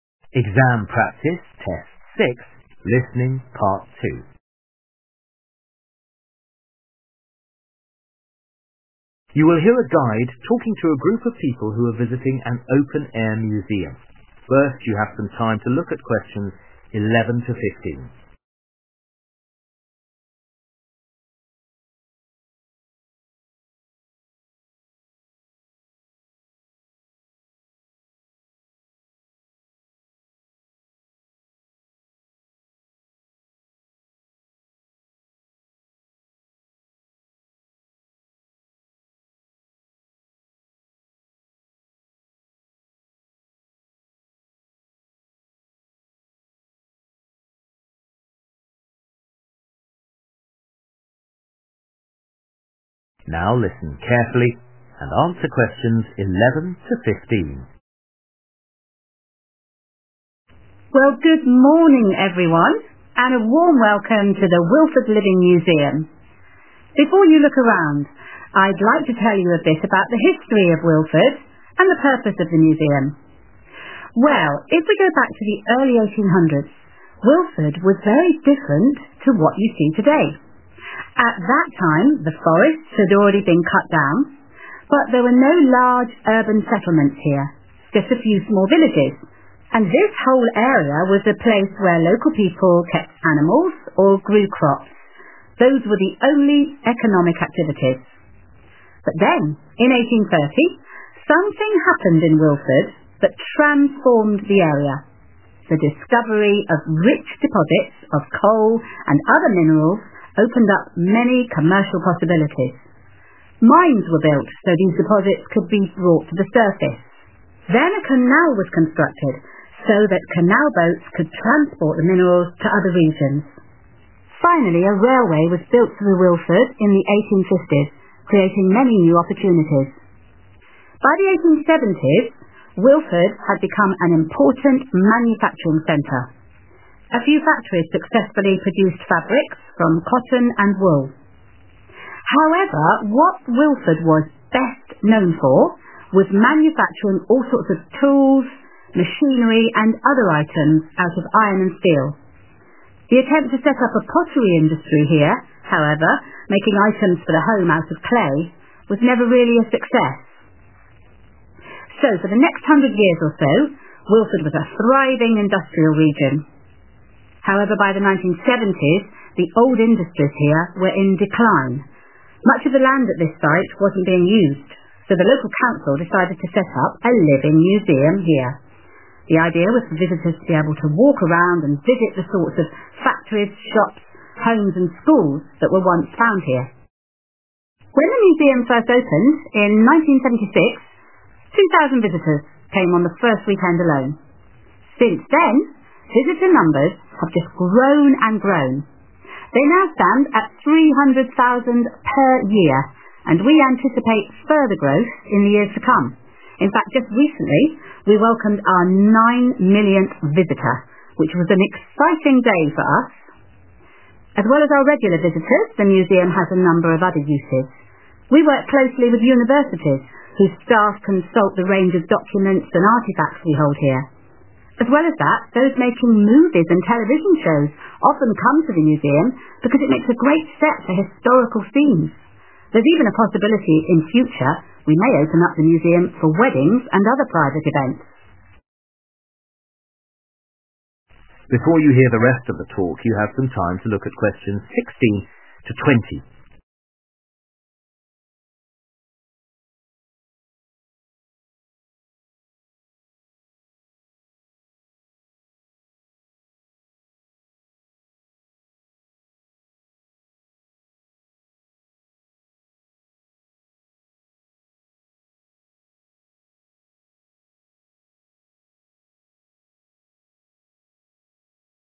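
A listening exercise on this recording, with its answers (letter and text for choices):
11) In the early 1800s most land in Willford was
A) occupied by houses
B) used for farming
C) covered in trees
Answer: B) used for farming

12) What happened in 1830 in Willford?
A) Ships started to be built nearby.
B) The first trains arrived in the town.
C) Valuable substances were found underground.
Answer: C) Valuable substances were found underground.

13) By the 1870s Willford was most famous for making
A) various metal objects.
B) all types of clothing.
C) plates and cups.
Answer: A) various metal objects.

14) What does the guide say about visitors to the museum these days?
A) 900 visitors enter on a typical day.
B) 7,600 visitors arrive every week.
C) 300,000 visitors come each year.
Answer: C) 300,000 visitors come each year.

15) The museum is also sometimes used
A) as a location for filming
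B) for business conferences.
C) by people getting married.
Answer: A) as a location for filming

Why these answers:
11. Well, if we go back to the early 1800s, Willford was very different to what you see today. (nếu chúng ta quay trở lại thời điểm đầu những năm 1800, Willford rất khác so với những gì bạn thấy ngày nay.) At that time, the forests had already been cut down. But there were no large urban settlements here, just a few small villages, and this whole area was a place where local people kept animals or grew crops – those were the only economic activities. (toàn bộ khu vực này là nơi người dân địa phương nuôi động vật hoặc trồng trọt – đó là những hoạt động kinh tế duy nhất ở nơi đây.)
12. But then in 1830, something happened in Willford that transformed the area. The discovery of rich deposits of coal and other minerals opened up many commercial possibilities. Mines were built, so these deposits could be brought to the surface. 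(Việc phát hiện ra mỏ than và các khoáng sản phong phú khác đã mở ra nhiều triển vọng thương mại. Các mỏ khai khoáng đã được xây dựng để có thể đưa quặng lên mặt đất.)
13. By the 1870s, Willford had become an important manufacturing centre. A few factories successfully produced fabrics from cotton and wool. However, what Willford was best known for, was manufacturing all sorts of tools, machinery and other items out of iron and steel. (điều khiến Willford được biết đến nhiều nhất là việc sản xuất tất cả các loại công cụ, máy móc và các vật dụng khác bằng sắt và thép.)
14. When the museum first opened in 1976, 2000 visitors came on the first weekend alone. Since then, visitor numbers have just grown and grown. They now stand at 300,000 per year and we anticipate further growth in the years to come. (Hiện có khoảng 300,000 du khách đến đây mỗi năm và chúng tôi dự đoán rằng con số này còn lớn hơn nữa trong những năm sắp tới.) In fact, just recently we welcomed our 9 millionth visitor, which was an exciting day for us.
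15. As well as that, those making movies and television shows often come to the museum because it makes a great set for historical scenes. (những người làm phim và chương trình truyền hình thường đến bảo tàng, bởi nó là một bối cảnh tuyệt vời cho những cảnh quay lịch sử.) There's even a possibility in future we may open up the museum for weddings and other private events.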